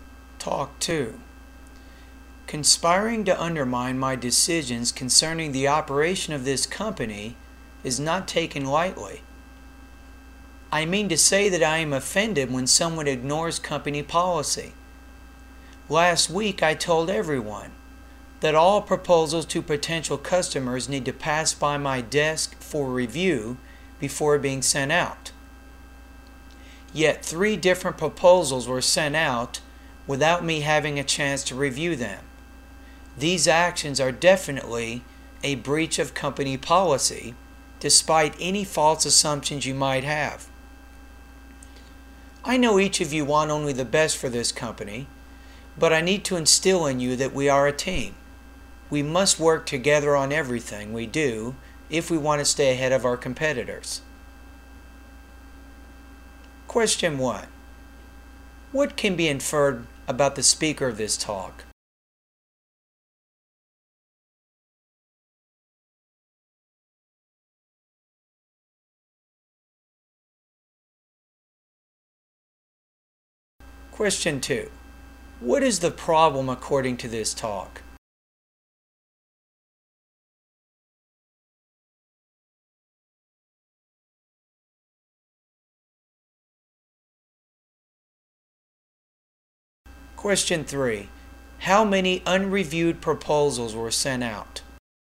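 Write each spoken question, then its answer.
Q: What is the problem according to this talk?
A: Proposals were sent to customers without the speaker's review, against company policy

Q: How many unreviewed proposals were sent out?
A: Three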